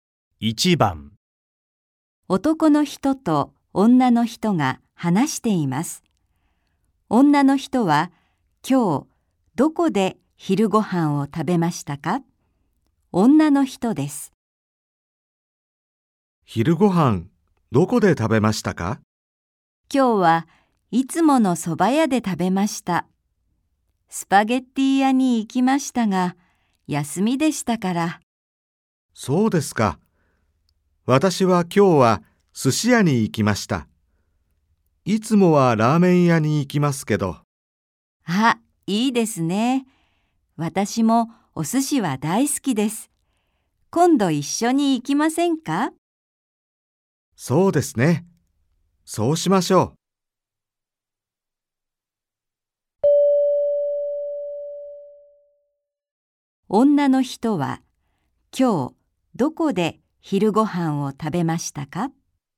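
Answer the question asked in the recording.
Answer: いつもの蕎麦屋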